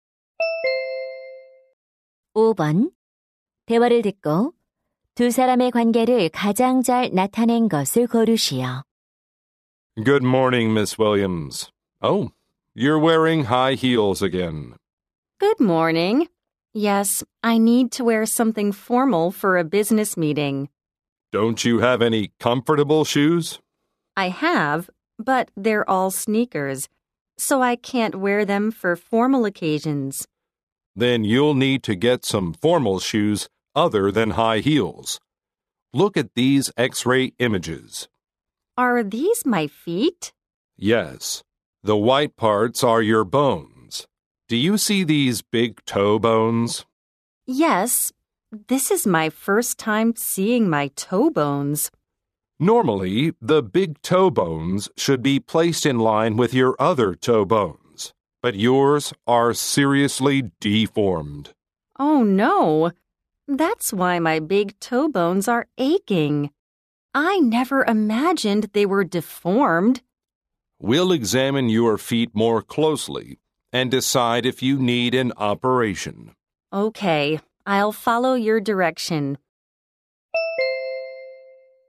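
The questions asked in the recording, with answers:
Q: 대화를 듣고 두 사람의 관계를 가장 잘 나타낸 것을 고르시오.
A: 의사 - 환자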